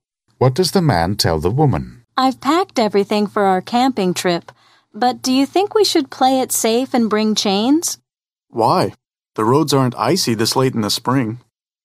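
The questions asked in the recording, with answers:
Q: What does the man imply about the roads?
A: They won't be icy, so chains aren't needed.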